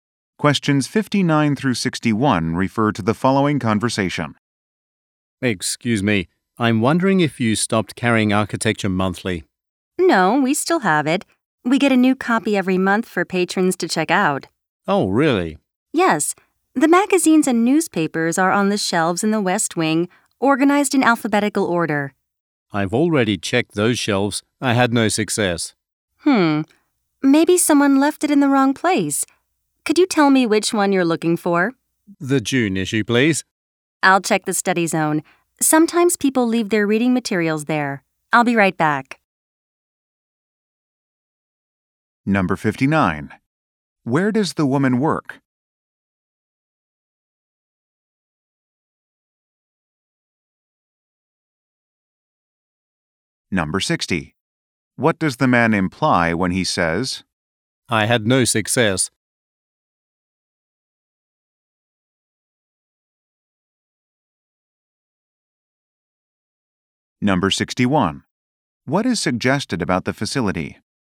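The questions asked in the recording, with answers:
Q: Where does the woman work?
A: At a library

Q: What does the man imply when he says,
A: He could not find the magazine on the shelves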